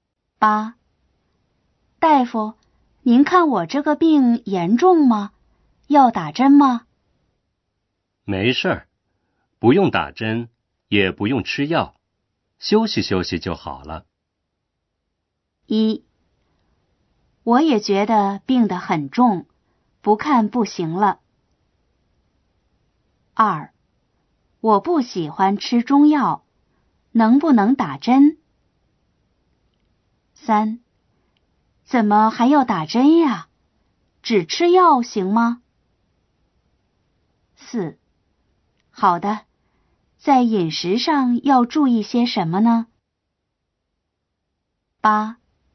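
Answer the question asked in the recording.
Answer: 4: 好的,在饮食上要注意些什么呢?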